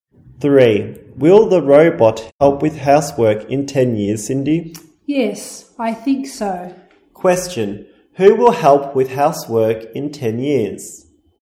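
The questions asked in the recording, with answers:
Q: Who will help with housework in 10 years?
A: Robots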